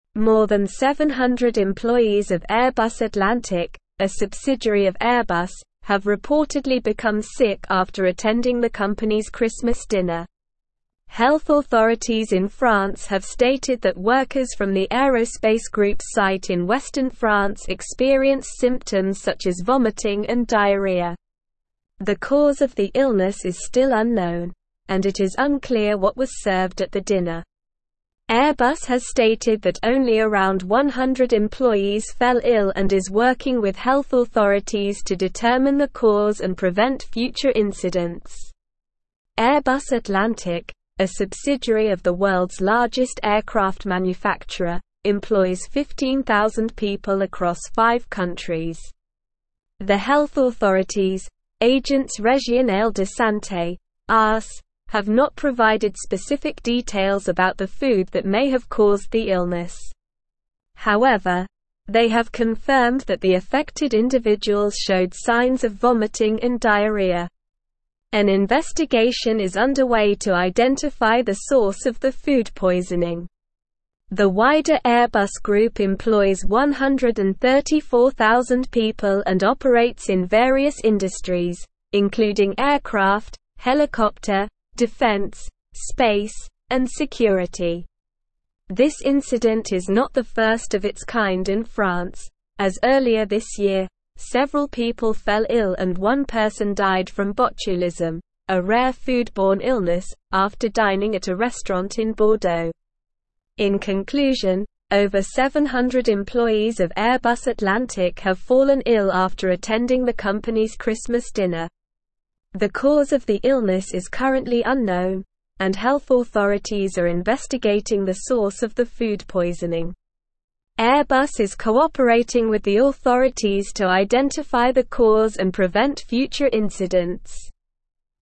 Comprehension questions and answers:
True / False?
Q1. Health authorities in France have confirmed that workers experienced symptoms such as vomiting and diarrhea.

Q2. Airbus has stated that only around 100 employees fell ill.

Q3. Less than 700 employees of Airbus Atlantic have become sick after attending the company's Christmas dinner.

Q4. An investigation is underway to identify the source of the food poisoning.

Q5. The cause of the illness is still unknown.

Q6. Airbus Atlantic employs 10,000 people across five countries.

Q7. It is clear what was served at the dinner.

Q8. This incident is the first of its kind in France, as earlier this year, no people fell ill and no person died from botulism after dining at a restaurant in Bordeaux.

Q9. More than 700 employees of Airbus (1)______, a subsidiary of Airbus, have reportedly become sick after attending the company's Christmas dinner.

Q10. Health authorities in France have (2)______ that workers from the aerospace group's site in western France experienced symptoms such as vomiting and (3)______.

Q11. Health authorities in France have (2)______ that workers from the aerospace group's site in western France experienced symptoms such as vomiting and (3)______.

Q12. The cause of the (4)______ is still unknown, and it is unclear what was served at the dinner.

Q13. Airbus has stated that only around 100 employees fell ill and is working with (5)______ (6)______ to determine the cause and prevent future incidents.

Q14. Airbus has stated that only around 100 employees fell ill and is working with (5)______ (6)______ to determine the cause and prevent future incidents.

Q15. Airbus Atlantic, a subsidiary of the world's largest (7)______ manufacturer, employs 15,000 people across five countries.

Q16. The health authorities, Agence Régionale de Santé (ARS), have not (8)______ specific details about the food that may have caused the illness.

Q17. However, they have confirmed that the affected individuals showed (9)______ of vomiting and diarrhea.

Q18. The wider (10)______ group employs 134,000 (11)______ and operates in various industries, including aircraft, helicopter, defense, space, and security.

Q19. The wider (10)______ group employs 134,000 (11)______ and operates in various industries, including aircraft, helicopter, defense, space, and security.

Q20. This incident is not the (12)______ of its kind in France, as earlier this year, several people fell ill and one person died from botulism, a rare food-borne illness, after dining at a restaurant in Bordeaux.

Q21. In (13)______, over 700 (14)______ of Airbus Atlantic have fallen ill after attending the company's Christmas dinner.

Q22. In (13)______, over 700 (14)______ of Airbus Atlantic have fallen ill after attending the company's Christmas dinner.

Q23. The (15)______ of the illness is currently unknown, and health authorities are investigating the (16)______ of the food poisoning.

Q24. The (15)______ of the illness is currently unknown, and health authorities are investigating the (16)______ of the food poisoning.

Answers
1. True
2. True
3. False
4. True
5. True
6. False
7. False
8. False
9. Atlantic
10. stated
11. diarrhea
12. illness
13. health
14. authorities
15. aircraft
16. provided
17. signs
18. Airbus
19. people
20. first
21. conclusion
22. employees
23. cause
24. source

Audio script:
More than 700 employees of Airbus Atlantic, a subsidiary of Airbus, have reportedly become sick after attending the company's Christmas dinner. Health authorities in France have stated that workers from the aerospace group's site in western France experienced symptoms such as vomiting and diarrhea. The cause of the illness is still unknown, and it is unclear what was served at the dinner. Airbus has stated that only around 100 employees fell ill and is working with health authorities to determine the cause and prevent future incidents.
Airbus Atlantic, a subsidiary of the world's largest aircraft manufacturer, employs 15,000 people across five countries. The health authorities, Agence Régionale de Santé (ARS), have not provided specific details about the food that may have caused the illness. However, they have confirmed that the affected individuals showed signs of vomiting and diarrhea.
The wider Airbus group employs 134,000 people and operates in various industries, including aircraft, helicopter, defense, space, and security. This incident is not the first of its kind in France, as earlier this year, several people fell ill and one person died from botulism, a rare food-borne illness, after dining at a restaurant in Bordeaux.
In conclusion, over 700 employees of Airbus Atlantic have fallen ill after attending the company's Christmas dinner. The cause of the illness is currently unknown, and health authorities are investigating the source of the food poisoning. Airbus is cooperating with the authorities to identify the cause and prevent future incidents.

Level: Level 4